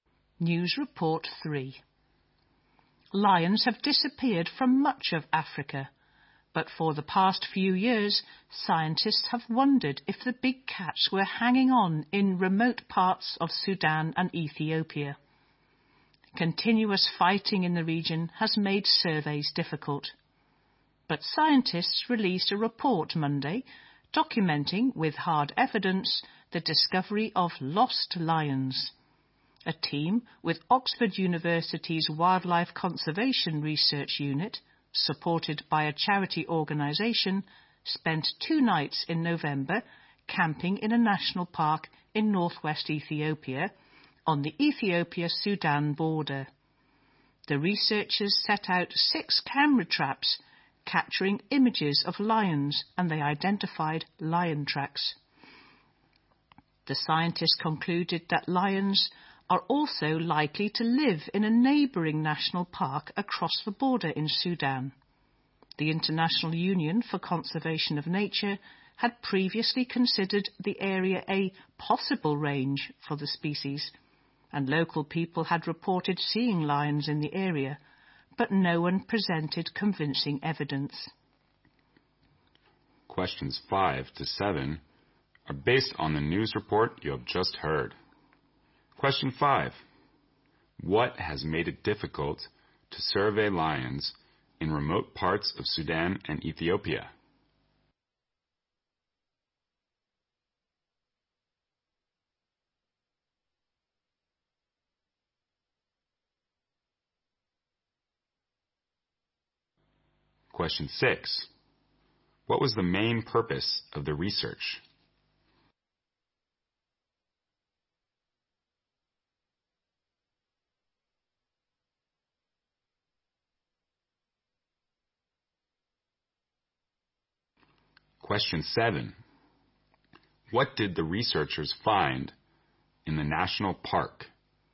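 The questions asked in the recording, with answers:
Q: What has made it difficult to survey lions in remote parts of Sudan and Ethiopia?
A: Continuous fighting in the region

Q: What was the main purpose of the research?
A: To find out if lions still survive in remote parts of Sudan and Ethiopia

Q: What did the researchers find in the national park?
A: Evidence of lions: camera-trap images and lion tracks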